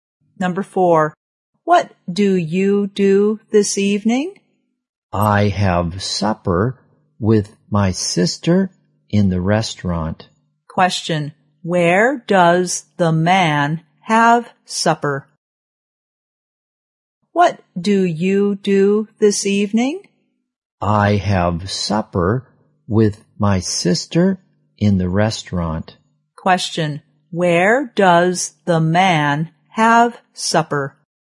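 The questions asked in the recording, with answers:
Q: Question, where does the man have supper?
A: In the restaurant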